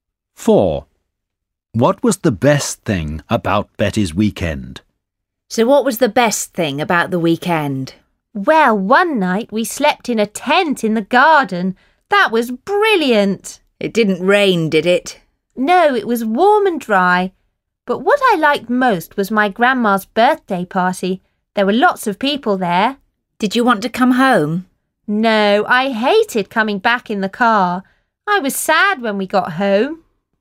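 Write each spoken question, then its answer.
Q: What was the best thing about Betty's weekend?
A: Her grandma's birthday party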